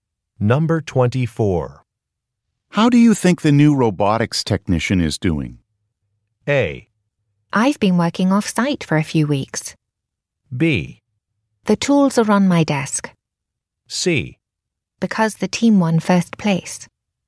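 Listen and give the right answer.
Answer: A: I've been working off-site for a few weeks.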